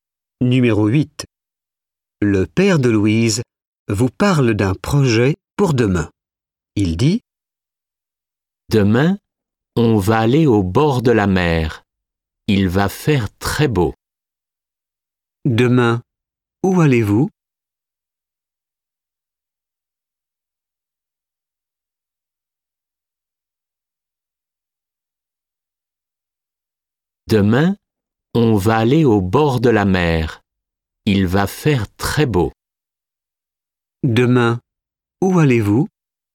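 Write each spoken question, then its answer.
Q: Demain, où allez-vous?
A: au bord de la mer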